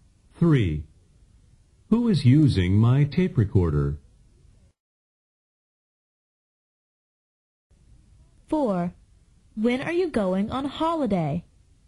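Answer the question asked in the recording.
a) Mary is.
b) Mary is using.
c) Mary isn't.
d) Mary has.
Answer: a) Mary is.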